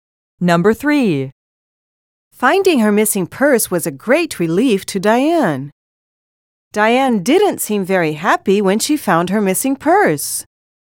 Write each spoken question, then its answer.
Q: Finding her missing purse was a great relief to Diane. Diane didn't seem very happy when she found her missing purse.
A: Different is the correct answer.